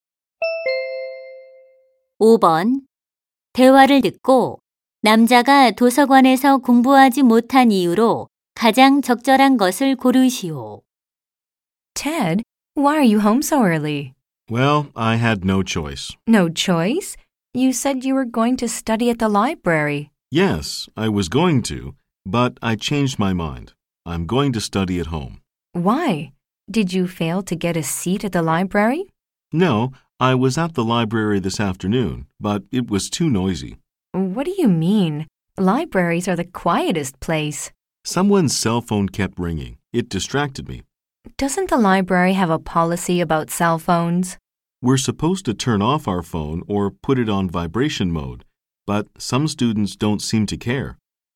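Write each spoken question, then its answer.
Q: 대화를 듣고 남자가 도서관에서 공부하지 못한 이유로 가장 적절한 것을 고르시오.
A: 누군가의 휴대전화가 계속 울려서 시끄러웠기 때문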